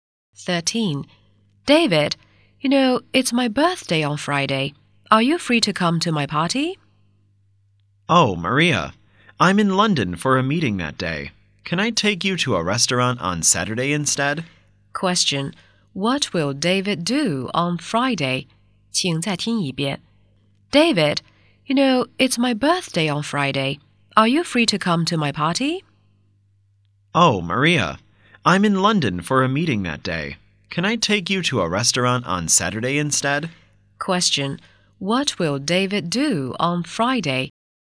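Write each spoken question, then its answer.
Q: What will David do on Friday?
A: Attend a meeting in London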